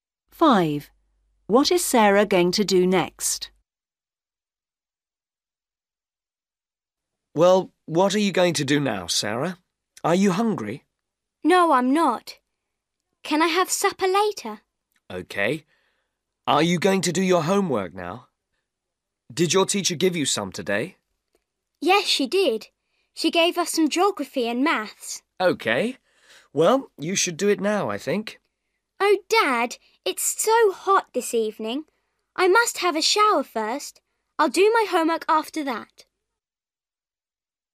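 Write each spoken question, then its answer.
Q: What is Sarah going to do next?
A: Have a shower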